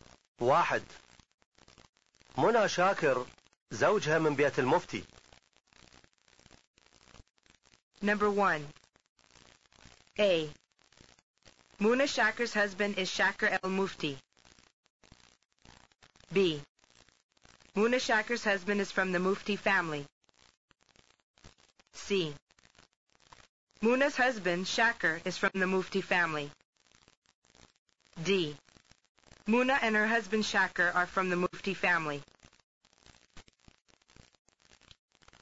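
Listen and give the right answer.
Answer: B: Muna Shakir's husband is from the Mufti family.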